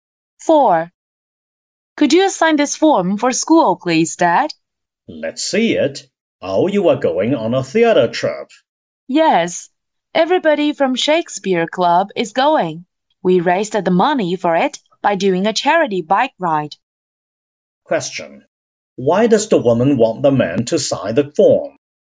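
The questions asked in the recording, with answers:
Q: Why does the woman want the man to sign the form?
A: So she can go on a school theater trip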